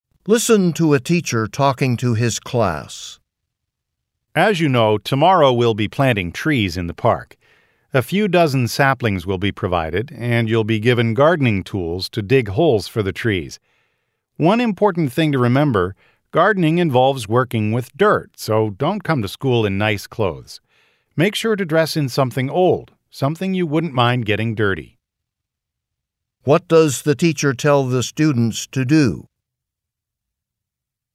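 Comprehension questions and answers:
What does the teacher tell the students to do?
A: Wear old clothes to school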